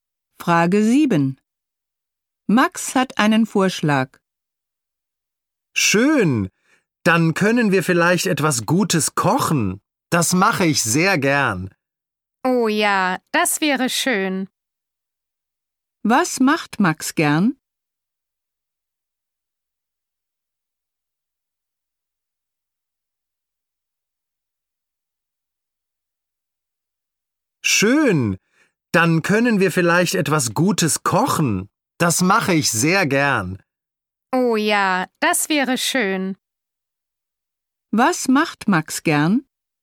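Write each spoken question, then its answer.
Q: Was macht Max gern?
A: Kochen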